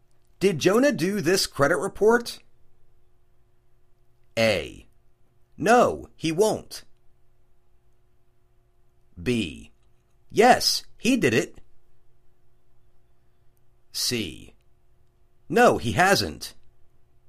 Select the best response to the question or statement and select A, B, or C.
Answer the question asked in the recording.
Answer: Yes, he did it.